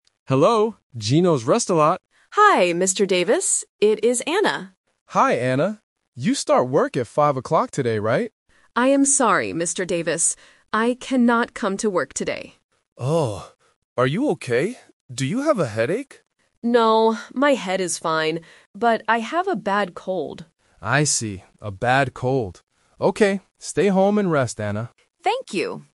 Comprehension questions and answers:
Listen to the phone conversation between a manager and a waitress. Choose the correct answer (A, B, or C).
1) Why is Anna calling?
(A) To order some food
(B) To say she cannot work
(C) To ask for a job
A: To say she cannot work

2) What time does Anna usually start work today?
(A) 5:00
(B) 15:00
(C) 9:00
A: 5:00

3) What is wrong with Anna?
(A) She has a headache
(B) She is very tired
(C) She has a bad cold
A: She has a bad cold

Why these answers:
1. Anna clearly says, "I cannot come to work today."
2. Mr. Davis asks, "You start work at 5:00 today, right?" and Anna does not say this time is wrong; she only says she cannot come.
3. Anna states her problem clearly: "I have a bad cold." Mr. Davis also repeats, "A bad cold."

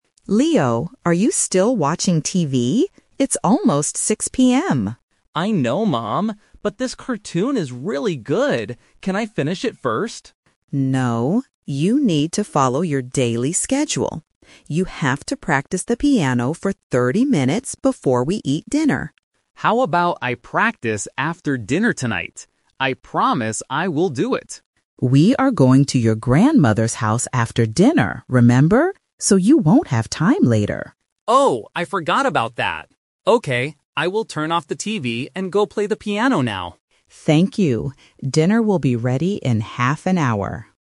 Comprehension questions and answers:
Listen to the conversation between a mother and her son. Choose the correct answer (A, B, or C) for each question.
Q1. What does the mother want Leo to do?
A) Watch a cartoon.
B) Eat dinner right now.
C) Practice the piano.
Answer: Practice the piano.

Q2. Why can't Leo practice his instrument after dinner?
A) Because he has to do his homework.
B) Because he is going to his grandmother's house.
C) Because his favorite cartoon is on TV.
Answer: Because he is going to his grandmother's house.

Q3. What is Leo going to do next?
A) Turn off the TV and practice music.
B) Finish watching his TV show.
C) Go to his grandmother's house.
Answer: Turn off the TV and practice music.

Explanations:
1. The mother clearly says, "You have to practice the piano for 30 minutes." Option (A) is a trap because Leo is currently watching a cartoon and wants to finish it, but his mother says no. Option (B) is incorrect because dinner is not ready yet; it will be ready in "half an hour."
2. When Leo asks to practice after dinner, his mom says, "We are going to your grandmother's house after dinner... So you won't have time later." Option (A) is a plausible reason but is never mentioned in the audio. Option (C) is a trap using a keyword ("cartoon") from the beginning of the conversation.
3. At the end of the conversation, Leo agrees with his mom and says, "Okay, I will turn off the TV and go play the piano now." Option (B) is a trap because he originally wanted to do this, but changed his mind after his mom reminded him of their plans. Option (C) is a trap because they will go to the grandmother's house after dinner, not next.

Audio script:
Mom: Leo, are you still watching TV? It's almost 6 PM.
Son: I know, Mom. But this cartoon is really good. Can I finish it first?
Mom: No, you need to follow your daily schedule. You have to practice the piano for 30 minutes before we eat dinner.
Son: How about I practice after dinner tonight? I promise I will do it.
Mom: We are going to your grandmother's house after dinner, remember? So you won't have time later.
Son: Oh, I forgot about that. Okay, I will turn off the TV and go play the piano now.

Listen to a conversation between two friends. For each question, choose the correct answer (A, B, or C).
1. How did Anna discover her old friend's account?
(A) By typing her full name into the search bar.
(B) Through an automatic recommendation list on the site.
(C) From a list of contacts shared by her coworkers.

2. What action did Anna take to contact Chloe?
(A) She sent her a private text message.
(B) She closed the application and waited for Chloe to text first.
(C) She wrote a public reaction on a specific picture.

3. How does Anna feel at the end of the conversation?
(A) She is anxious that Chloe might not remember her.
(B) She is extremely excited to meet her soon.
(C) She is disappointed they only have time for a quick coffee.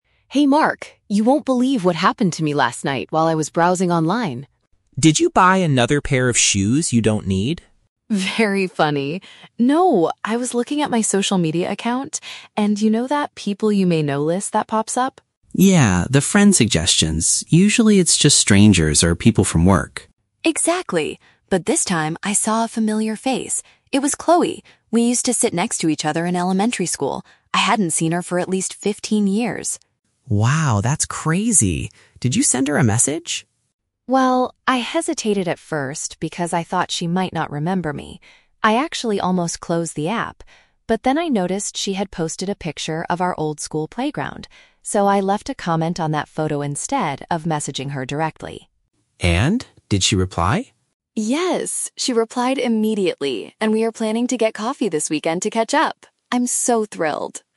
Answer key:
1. Through an automatic recommendation list on the site.
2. She wrote a public reaction on a specific picture.
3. She is extremely excited to meet her soon.

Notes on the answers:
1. Anna says she saw her friend on the "People You May Know" list, which is an automatic recommendation list (friend suggestions). Option (A) is not mentioned. Option (C) is a trap; Mark mentions that the list usually shows "people from work" (coworkers), but Anna didn't find her friend through her coworkers.
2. Anna says she "left a comment on that photo," which means she wrote a public reaction on a picture. Option (A) is a trap; Mark asks if she sent a message, but she says she did this "instead of messaging her directly." Option (B) is a trap; she "almost closed the app," but she didn't actually do it.
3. Anna says they are planning to get coffee and she is "so thrilled," which means extremely excited. Option (A) is a trap; she was anxious at first ("I thought she might not remember me"), but her feeling at the end is happy. Option (C) is a trap; she mentions getting coffee, but she is not disappointed about it at all.

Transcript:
Anna: Hey Mark, you won't believe what happened to me last night while I was browsing online.
Mark: Did you buy another pair of shoes you don't need?
Anna: Very funny. No! I was looking at my social media account, and you know that "People You May Know" list that pops up?
Mark: Yeah, the friend suggestions. Usually, it's just strangers or people from work.
Anna: Exactly! But this time, I saw a familiar face. It was Chloe! We used to sit next to each other in elementary school. I hadn't seen her for at least fifteen years.
Mark: Wow, that's crazy! Did you send her a message?
Anna: Well, I hesitated at first because I thought she might not remember me. I actually almost closed the app. But then I noticed she had posted a picture of our old school playground. So, I left a comment on that photo instead of messaging her directly.
Mark: And? Did she reply?
Anna: Yes! She replied immediately and we are planning to get coffee this weekend to catch up. I'm so thrilled!

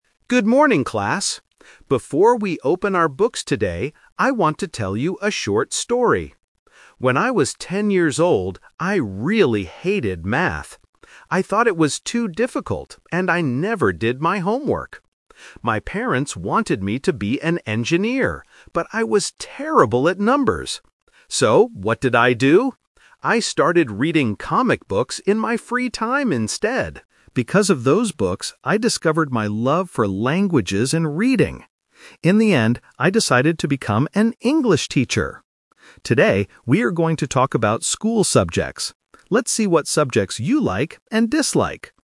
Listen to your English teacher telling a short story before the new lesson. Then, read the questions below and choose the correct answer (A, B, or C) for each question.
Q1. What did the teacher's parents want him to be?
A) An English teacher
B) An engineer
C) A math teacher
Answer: An engineer

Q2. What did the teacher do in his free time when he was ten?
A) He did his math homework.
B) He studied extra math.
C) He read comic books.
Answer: He read comic books.

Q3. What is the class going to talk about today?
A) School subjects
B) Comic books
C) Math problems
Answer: School subjects

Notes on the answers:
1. The teacher clearly says, "My parents wanted me to be an engineer." Option (A) is a trap; becoming an English teacher is what he actually did in the end, not what his parents planned for him. Option (C) is a trap; math is mentioned, but he was terrible at it.
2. The teacher says, "I started reading comic books in my free time instead." Option (A) is a trap; he clearly states, "I never did my homework." Option (B) is also wrong because he hated math and was terrible at numbers.
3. At the end of the story, he introduces the lesson by saying, "Today, we are going to talk about school subjects." Option (B) is a trap; comic books are part of his childhood story, not the topic for today's class. Option (C) is a trap; math is mentioned in his story, but this is an English class.

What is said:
Good morning, class! Before we open our books today, I want to tell you a short story. When I was ten years old, I really hated math. I thought it was too difficult, and I never did my homework. My parents wanted me to be an engineer, but I was terrible at numbers. So, what did I do? I started reading comic books in my free time instead. Because of those books, I discovered my love for languages and reading. In the end, I decided to become an English teacher! Today, we are going to talk about school subjects. Let's see what subjects you like and dislike...

